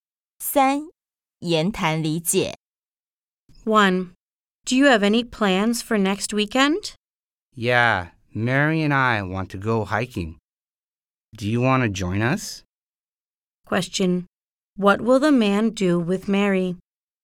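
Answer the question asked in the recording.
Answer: Go hiking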